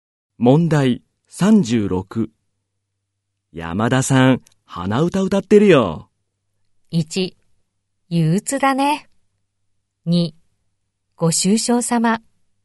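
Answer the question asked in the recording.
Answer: 3: ご機嫌だね。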